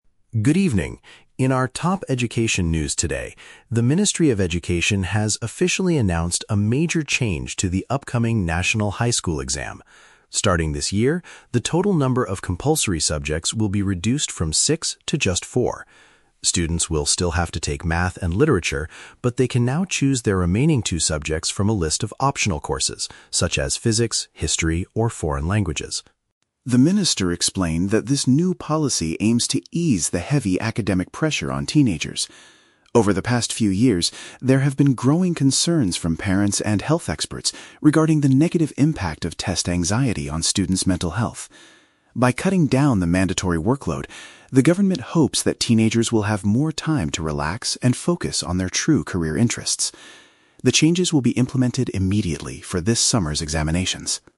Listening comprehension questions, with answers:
Listen to a news reporter talking about the national education system and choose the correct answer (A, B, or C) for each question.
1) What is the main change to the national test?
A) Candidates are required to complete fewer mandatory papers.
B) Students must take examinations in all six different subjects.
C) The government has removed the Math and Literature tests.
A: A) Candidates are required to complete fewer mandatory papers.

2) Why did the Ministry of Education introduce this new policy?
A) To address the parents' complaints about expensive school fees.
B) To help teenagers feel less stressed about their studies.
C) To improve the overall quality of high school teaching.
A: B) To help teenagers feel less stressed about their studies.

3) When will these new rules take effect?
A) At the beginning of the next academic year in autumn.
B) After the current students graduate from their universities.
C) During the examination period this upcoming summer.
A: C) During the examination period this upcoming summer.

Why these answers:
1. The reporter says the "compulsory subjects will be reduced". Option A paraphrases "compulsory subjects" as "mandatory papers" and "reduced" as "fewer". The Trap: Option (B) is a trap using the number "six" from the audio, but six was the old number of subjects, not the new rule. Option (C) is a trap using "Math and Literature", but the audio explicitly states students "will still have to take" them, not that they were removed.
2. The audio states the policy aims to "ease the heavy academic pressure" and reduce "test anxiety". Option B paraphrases this as "feel less stressed". The Trap: Option (A) is a trap. The audio mentions "parents," but parents were concerned about "mental health" and "anxiety," not "expensive school fees". Option (C) is a plausible goal for an education ministry but is never mentioned in the report.
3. The reporter states at the very end that the changes "will be implemented immediately for this summer's examinations." Option C perfectly matches this information. The Trap: Option (A) is a logical assumption for when school policies usually change (next academic year), but it contradicts the audio's "implemented immediately". Option (B) is entirely fabricated and not mentioned.

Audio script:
News Reporter: Good evening. In our top education news today, the Ministry of Education has officially announced a major change to the upcoming National High School Exam. Starting this year, the total number of compulsory subjects will be reduced from six to just four. Students will still have to take Math and Literature, but they can now choose their remaining two subjects from a list of optional courses, such as Physics, History, or Foreign Languages.
The Minister explained that this new policy aims to ease the heavy academic pressure on teenagers. Over the past few years, there have been growing concerns from parents and health experts regarding the negative impact of test anxiety on students' mental health. By cutting down the mandatory workload, the government hopes that teenagers will have more time to relax and focus on their true career interests. The changes will be implemented immediately for this summer's examinations.

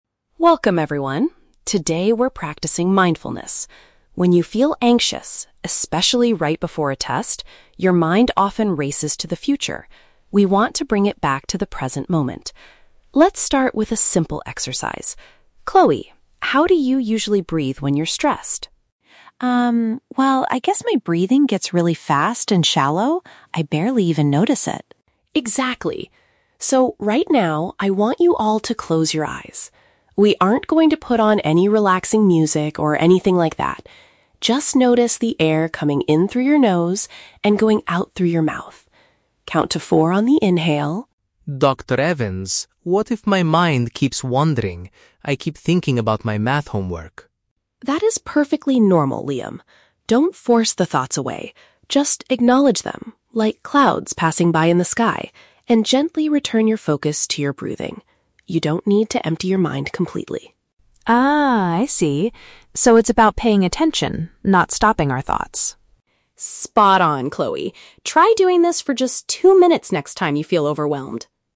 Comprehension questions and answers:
Listen to a conversation between a school psychologist and two students. Choose the correct answer (A, B, or C) for each question.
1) According to Dr. Evans, what happens to students' minds when they experience anxiety?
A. They concentrate too much on their past mistakes.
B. They think excessively about things that have not happened yet.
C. They focus deeply on their physical breathing.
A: B. They think excessively about things that have not happened yet.

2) What does Dr. Evans ask the students to do during the mindfulness exercise?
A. Play some relaxing music in the background.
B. Completely clear their minds of any thoughts.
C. Pay close attention to how they inhale and exhale.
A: C. Pay close attention to how they inhale and exhale.

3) What should Liam do when distracting thoughts about his homework appear?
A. Try very hard to push the thoughts out of his head.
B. Notice the thoughts but bring his attention back to his breath.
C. Take a short break to finish his math assignment.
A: B. Notice the thoughts but bring his attention back to his breath.

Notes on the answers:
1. The Key: Dr. Evans says that when students feel anxious, their mind "races to the future". This is paraphrased as thinking about "things that have not happened yet". The Trap (C): Focusing on physical breathing is what they should do to calm down, not what their minds naturally do when they are anxious (Mentioned but wrong context). Plausible Trap (A): Thinking about past mistakes is a common symptom of anxiety, but Dr. Evans does not mention this in the audio.
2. The Key: Dr. Evans tells the students to "notice the air coming in through your nose and going out". This matches the phrase "Pay close attention to how they inhale and exhale". The Trap (A): Music is mentioned, but Dr. Evans explicitly says, "We aren't going to put on any relaxing music" (Mentioned but rejected). The Trap (B): Emptying the mind is mentioned, but Dr. Evans says, "You don't need to empty your mind completely" (Mentioned but rejected).
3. The Key: Dr. Evans tells Liam to "acknowledge them [the thoughts]... and gently return your focus to your breathing". This is paraphrased perfectly in option B. The Trap (A): Dr. Evans specifically tells Liam, "Don't force the thoughts away," which makes option A the exact opposite of her advice. Plausible Trap (C): Finishing the homework might stop him from worrying about it, but this is not the mindfulness technique Dr. Evans is teaching.

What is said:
The Key: Dr.
Today we're practicing mindfulness. When you feel anxious, especially right before a test, your mind often races to the future. We want to bring it back to the present moment. Let's start with a simple exercise. Chloe, how do you usually breathe when you're stressed?
Chloe: Um, well, I guess my breathing gets really fast and shallow. I barely even notice it.
Dr. Evans: Exactly. So, right now, I want you all to close your eyes. We aren't going to put on any relaxing music or anything like that. Just notice the air coming in through your nose and going out through your mouth. Count to four on the inhale.
Liam: Dr. Evans, what if my mind keeps wandering? I keep thinking about my math homework.
Dr. Evans: That is perfectly normal, Liam. Don't force the thoughts away. Just acknowledge them, like clouds passing by in the sky, and gently return your focus to your breathing. You don't need to empty your mind completely.
Chloe: Ah, I see. So it's about paying attention, not stopping our thoughts.
Dr. Evans: Spot on, Chloe. Try doing this for just two minutes next time you feel overwhelmed.

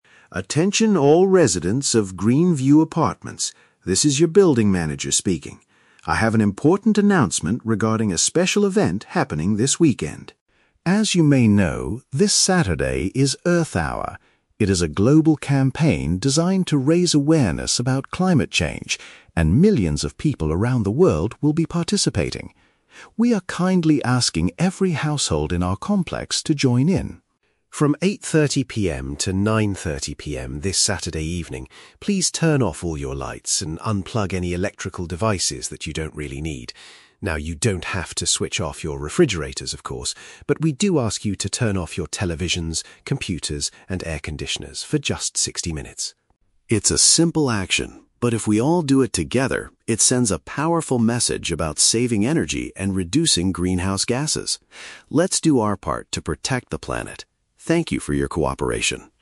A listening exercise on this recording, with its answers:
Listen to a public announcement in an apartment building and choose the correct answer (A, B, or C) for each question.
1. What is the main purpose of this announcement?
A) To inform everyone about a scheduled power cut in the area.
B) To encourage residents to participate in an environmental campaign.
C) To remind the tenants to pay their monthly electricity bills.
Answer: B) To encourage residents to participate in an environmental campaign.

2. What are the residents asked to do on Saturday evening?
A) Power down their non-essential electronic equipment.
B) Disconnect every appliance, including their refrigerators.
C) Gather outside the apartment building in the dark.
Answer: A) Power down their non-essential electronic equipment.

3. How long will this energy-saving event last?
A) For the entire weekend.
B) Until exactly 8:30 PM.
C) For one hour.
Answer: C) For one hour.

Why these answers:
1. The manager asks the residents to "join in" Earth Hour, which he describes as a "global campaign... to raise awareness about climate change." (Paraphrasing: encourage to participate = asking every household to join in; environmental campaign = campaign about climate change). Why the trap is wrong: Option (A) is a very common trap in this context. The lights will go out, but it is a voluntary action, not a forced "scheduled power cut." Option (C) is a plausible topic for a building manager, but electricity bills are never mentioned.
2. The speaker asks people to turn off devices that they "don't really need" (like TVs and computers). (Paraphrasing: power down = turn off / unplug; non-essential = don't really need). Why the trap is wrong: Option (B) is the trap. The manager explicitly states, "you don't have to switch off your refrigerators." Option (C) is a trap because the speaker mentions doing the action "together," but he means doing it collectively in their own homes, not physically gathering outside.
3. The event runs from 8:30 PM to 9:30 PM, and the speaker asks residents to turn off devices for "just 60 minutes." (Paraphrasing: one hour = 60 minutes / 8:30 PM to 9:30 PM). Why the trap is wrong: Option (A) is a trap. The manager says the event is happening "this weekend," but the action itself only lasts for 60 minutes, not the whole weekend. Option (B) is a trap using the time mentioned in the audio; 8:30 PM is when the event starts, not when it finishes.

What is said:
Henderson: Attention all residents of Greenview Apartments. This is your building manager speaking. I have an important announcement regarding a special event happening this weekend.
As you may know, this Saturday is "Earth Hour." It is a global campaign designed to raise awareness about climate change, and millions of people around the world will be participating. We are kindly asking every household in our complex to join in.
From 8:30 PM to 9:30 PM this Saturday evening, please turn off all your lights and unplug any electrical devices that you don't really need. Now, you don't have to switch off your refrigerators, of course. But we do ask you to turn off your televisions, computers, and air conditioners for just 60 minutes.
It's a simple action, but if we all do it together, it sends a powerful message about saving energy and reducing greenhouse gases. Let's do our part to protect the planet. Thank you for your cooperation!

